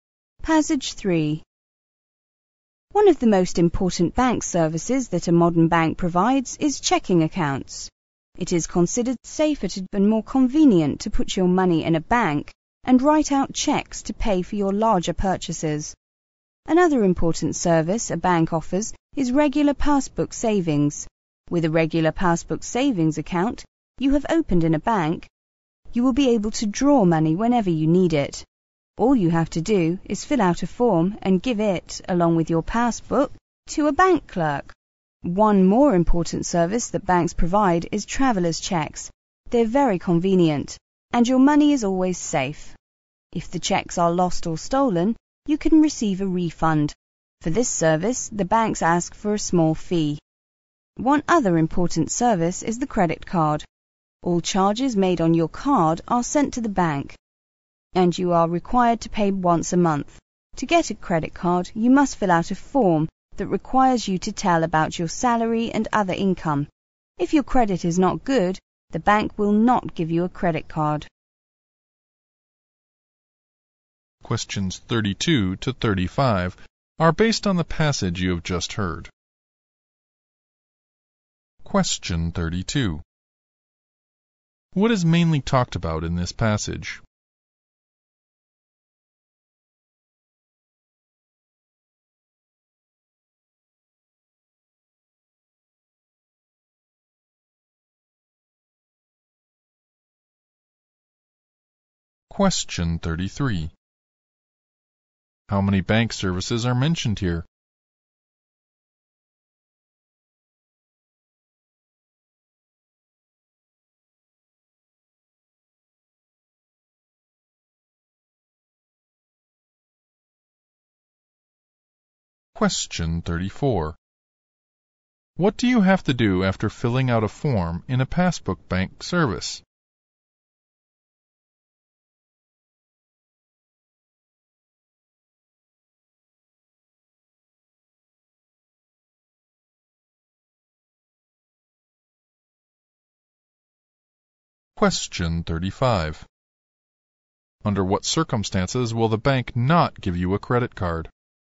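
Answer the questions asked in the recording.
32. Services that banks provide
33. Four
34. Give it with your passbook to a bank clerk
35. If your credit is not good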